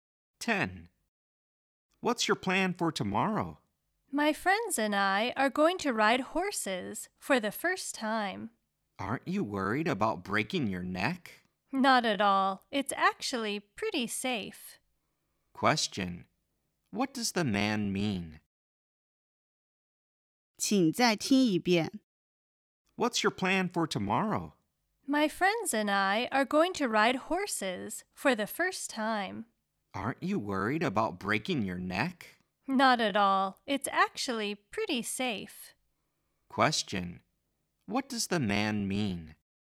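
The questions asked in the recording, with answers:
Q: What does the man mean?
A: Riding horses is pretty safe, so he isn't worried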